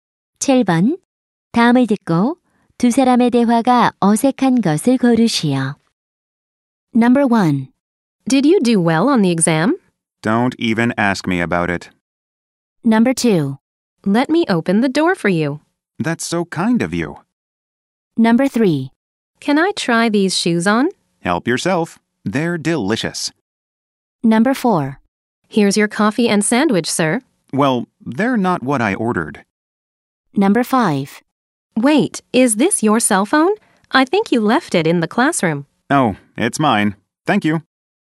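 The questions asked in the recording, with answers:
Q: 다음을 듣고 두 사람의 대화가 어색한 것을 고르시오.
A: 3번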